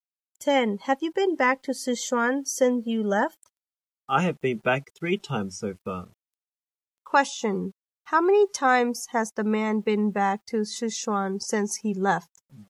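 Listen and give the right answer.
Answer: 3 times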